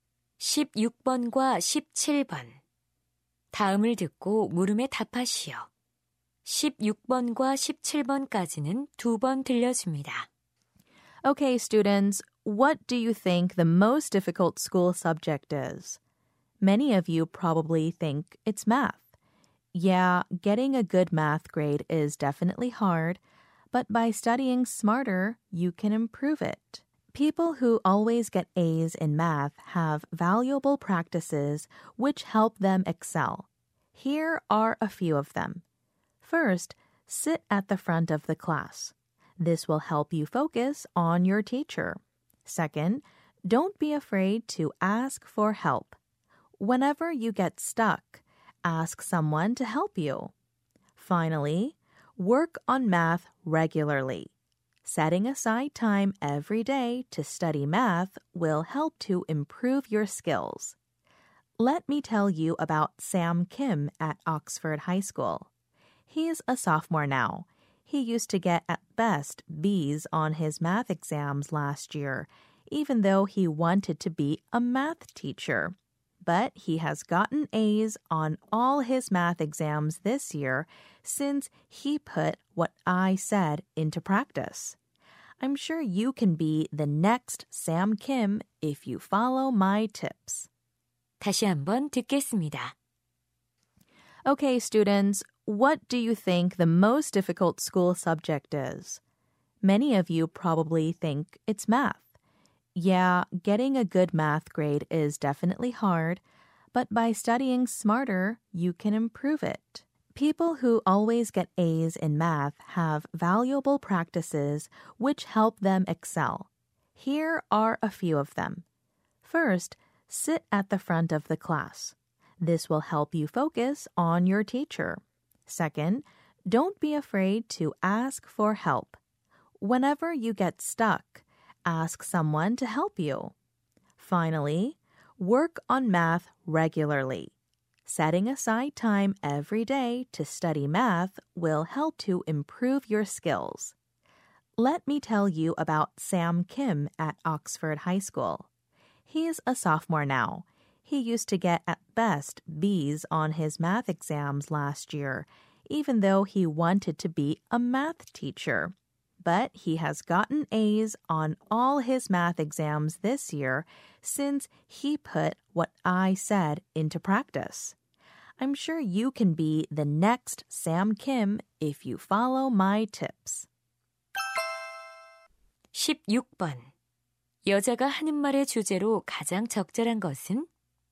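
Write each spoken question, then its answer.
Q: 여자가 하는 말의 주제로 가장 적절한 것은?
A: 수학 성적을 올리는 방법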